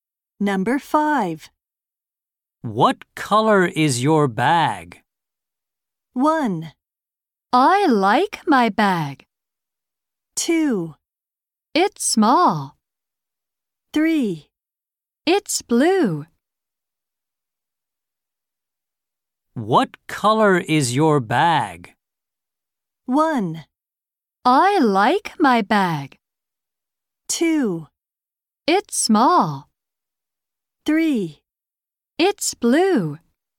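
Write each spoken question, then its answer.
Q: What color is your bag?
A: 3: It's blue.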